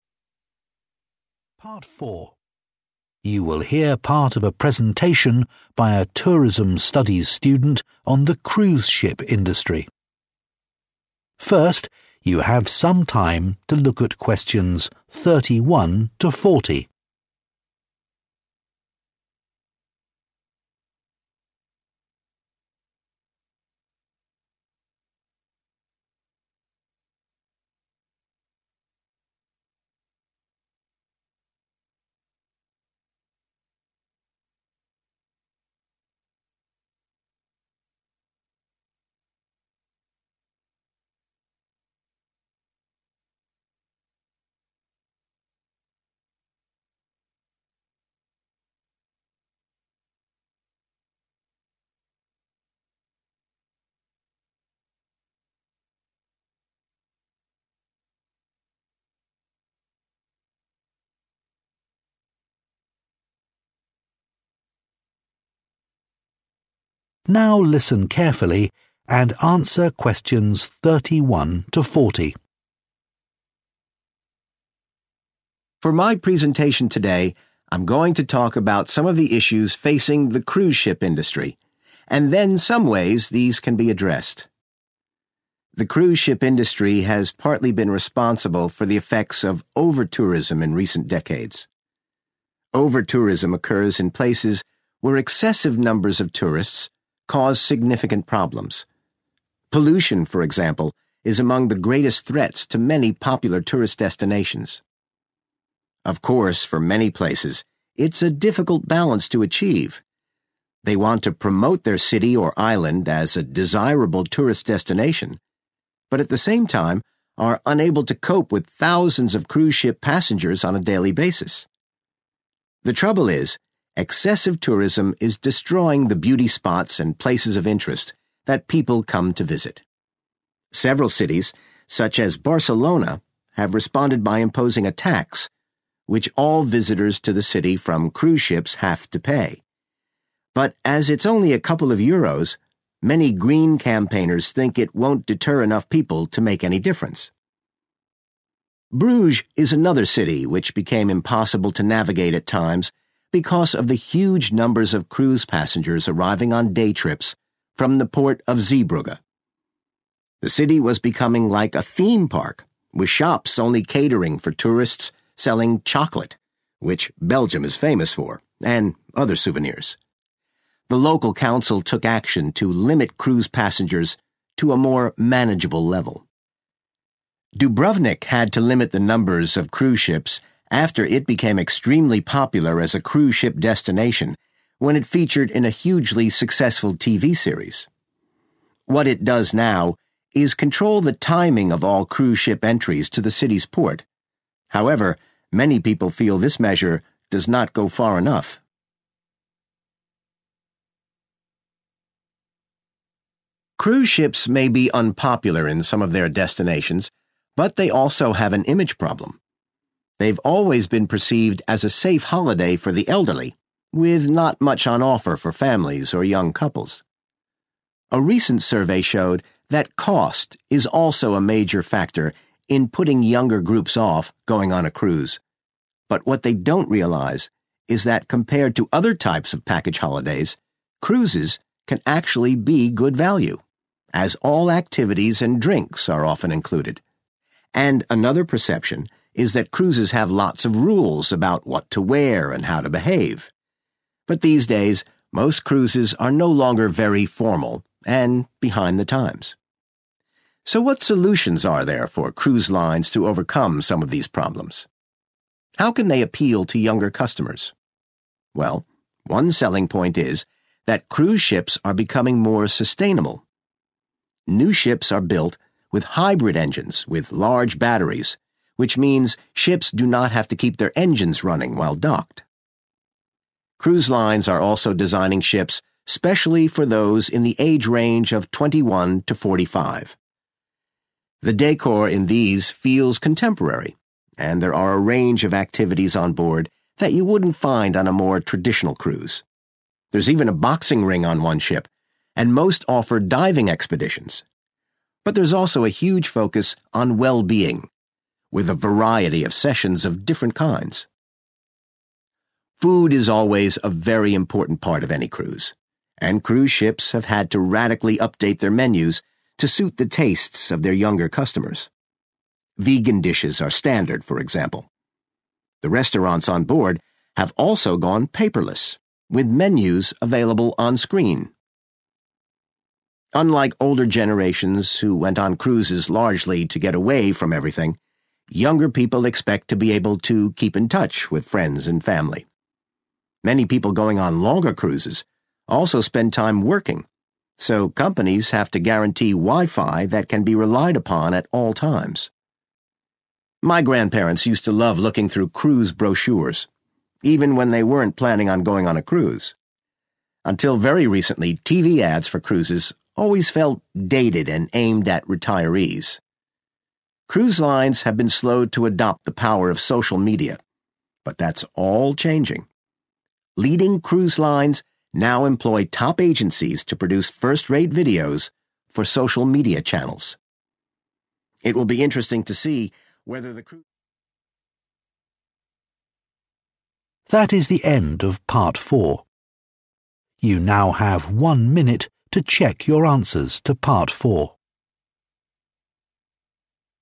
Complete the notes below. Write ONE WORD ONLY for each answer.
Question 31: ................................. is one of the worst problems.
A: Pollution

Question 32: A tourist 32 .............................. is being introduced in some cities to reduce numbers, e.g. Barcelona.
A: tax

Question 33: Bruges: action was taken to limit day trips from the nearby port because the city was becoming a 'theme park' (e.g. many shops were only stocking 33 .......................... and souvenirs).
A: chocolate

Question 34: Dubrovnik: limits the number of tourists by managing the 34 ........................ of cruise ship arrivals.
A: timing

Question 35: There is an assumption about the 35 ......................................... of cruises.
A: cost

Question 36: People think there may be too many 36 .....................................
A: rules

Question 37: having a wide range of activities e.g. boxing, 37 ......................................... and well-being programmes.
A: diving

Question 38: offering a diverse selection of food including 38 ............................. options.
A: vegan

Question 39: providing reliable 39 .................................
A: wifi

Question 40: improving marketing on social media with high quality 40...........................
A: videos

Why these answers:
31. Theo script, ô nhiễm là một trong những mối đe dọa lớn nhất đến các địa điểm du lịch
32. Theo script, nhiều thành phố đã áp đặt thuế đối với du khách => Đáp án là tax
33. Theo script, các cửa hàng ở Bruges chỉ bán sô-cô-la và đồ lưu niệm cho du khách => Đáp án là chocolate
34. Theo script, Dubrovnik giới hạn thời gian tàu du lịch được phép cập cảng để hạn chế du khách => Đáp án là timing
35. Theo script, tàu du lịch thường bị nhìn nhận không chính xác về nhiều mặt, một trong số đó là giá cả khiến người trẻ ngần ngại => Đáp án là cost
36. Theo script, một số người hiểu nhầm rằng tàu du lịch có nhiều quy định => Đáp án là rules
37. Theo script, một con tàu có thể cung cấp sàn đấu boxing, trải nghiệm lặn và nhiều chương trình về sức khỏe khác => Đáp án là diving
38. Theo script, các tàu du lịch thường xuyên cập nhật thực đơn, và các món chay là món cơ bản phải có => Đáp án là vegan
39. Theo script, tàu du lịch phải đảm bảo wifi để du khách làm việc => Đáp án là wifi
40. Theo script, những hãng tàu hàng đầu hiện tại đang đặt sản xuất các video chất lượng tốt nhất để đăng lên mạng xã hội => Đáp án là videos

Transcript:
For my presentation today, I'm going to talk about some of the issues facing the cruise ship industry, and then some ways these can be addressed.
The cruise ship industry has partly been responsible for the effects of overtourism in recent decades. Overtourism occurs in places where excessive numbers of tourists cause significant problems. Pollution, for example, is among the greatest threats to many popular tourist destinations.
Of course, for many places, it's a difficult balance to achieve. They want to promote their city or island as a desirable tourist destination, but at the same time, are unable to cope with thousands of cruise ship passengers on a daily basis. The trouble is, excessive tourism is destroying the beauty spots and places of interest that people come to visit. Several cities, such as Barcelona, have responded by imposing a tax, which all visitors to the city from cruise ships have to pay. But as it's only a couple of euros, many green campaigners think it won't deter enough people to make any difference.
Bruges is another city which became impossible to navigate at times because of the huge numbers of cruise passengers arriving on day trips from the port of Zeebrugge. The city was becoming like a theme park, with shops only catering for tourists selling chocolate, which Belgium is famous for, and other souvenirs. The local council took action to limit cruise passengers to a more manageable level.
Dubrovnik had to limit the numbers of cruise ships after it became extremely popular as a cruise ship destination when it featured in a hugely successful TV series. What it does now is control the timing of all cruise ship entries to the city's port. However, many people feel this measure does not go far enough.
Cruise ships may be unpopular in some of their destinations, but they also have an image problem. They've always been perceived as a safe holiday for the elderly, with not much on offer for families or young couples. A recent survey showed that cost is also a major factor in putting younger groups off going on a cruise. But what they don't realize is that compared to other types of package holidays, cruises can actually be good value, as all activities and drinks are often included. And another perception is that cruises have lots of rules about what to wear and how to behave. But these days, most cruises are no longer very formal, and behind the times.
So what solutions are there for cruise lines to overcome some of these problems? How can they appeal to younger customers? Well, one selling point is that cruise ships are becoming more sustainable. New ships are built with hybrid engines, with large batteries, which means ships do not have to keep their engines running while docked.
Cruise lines are also designing ships especially for those in the age range of 21 to 45. The decor in these feels contemporary, and there are a range of activities on board that you wouldn't find on a more traditional cruise. There's even a boxing ring on one ship, and most offer diving expeditions. But there's also a huge focus on well-being, with a variety of sessions of different kinds, such as yoga.
Food is always a very important part of any cruise, and cruise ships have had to radically update their menus to suit the tastes of their younger customers. Vegan dishes are standard, for example. The restaurants on board have also gone paperless, with menus available on screen.
Unlike older generations who went on cruises largely to get away from everything, younger people expect to be able to keep in touch with friends and family. Many people going on longer cruises also spend time working, so companies have to guarantee wifi that can be relied upon at all times.
My grandparents used to love looking through cruise brochures, even when they weren't planning on going on a cruise. Until very recently, TV ads for cruises always felt dated and aimed at retirees. Cruise lines have been slow to adopt the power of social media, but that's all changing. Leading cruise lines now employ top agencies to produce first-rate videos for social media channels. It will be interesting to see whether the cruise...